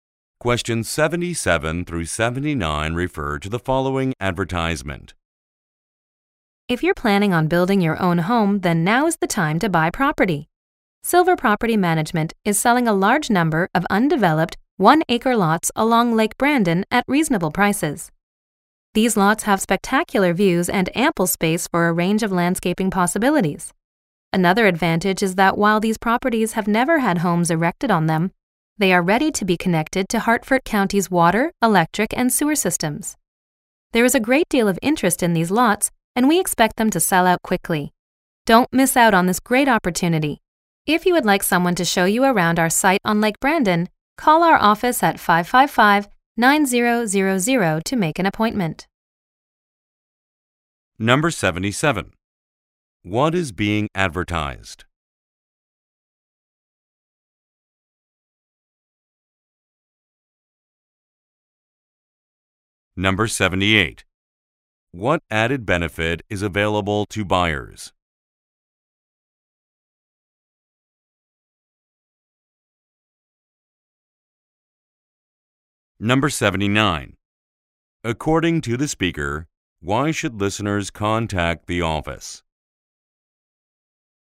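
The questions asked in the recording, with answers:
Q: What is being advertised?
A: Undeveloped lots of land for sale

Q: What added benefit is available to buyers?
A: The lots are ready to connect to water, electric and sewer systems

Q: According to the speaker, why should listeners contact the office?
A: To make an appointment for a tour of the site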